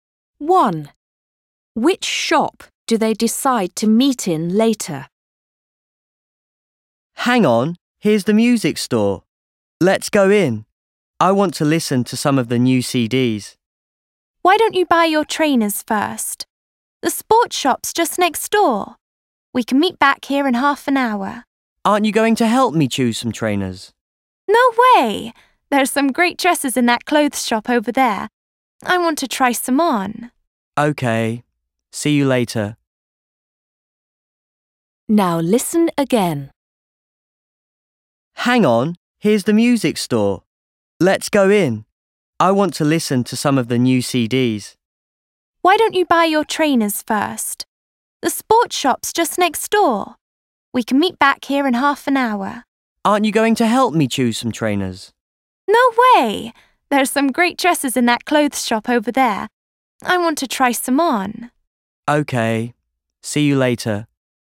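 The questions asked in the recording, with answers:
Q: Which shop do they decide to meet in later?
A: the music store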